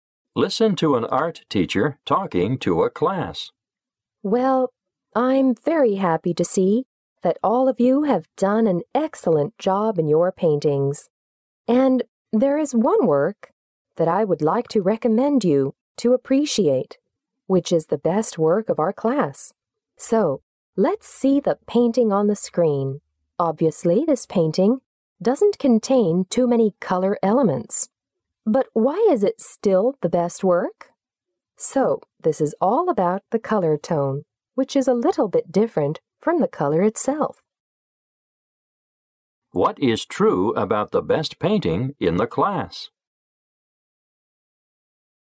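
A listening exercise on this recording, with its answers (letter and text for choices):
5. What is true about the best painting in the class?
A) It is a colorful work.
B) It adopts a unique color tone.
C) It contains many lines.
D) It just includes one color.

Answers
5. B) It adopts a unique color tone.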